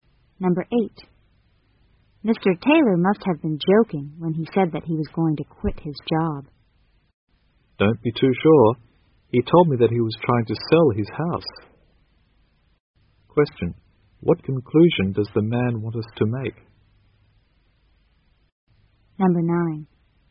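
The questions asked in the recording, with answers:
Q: what conclusion does the man want us to make?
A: Mr. Taylor may really quit his job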